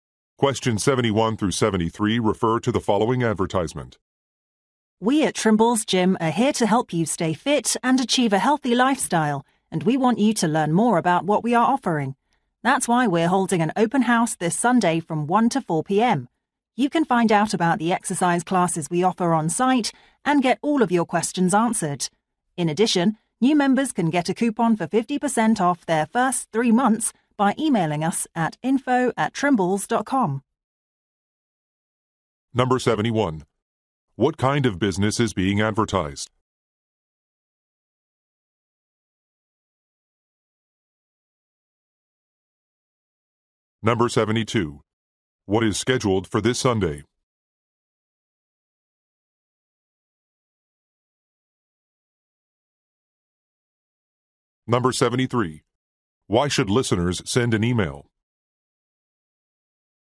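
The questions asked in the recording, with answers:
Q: What kind of business is being advertised?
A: A gym

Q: What is scheduled for this Sunday?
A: An open house

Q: Why should listeners send an email?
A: To get a 50% off coupon for new members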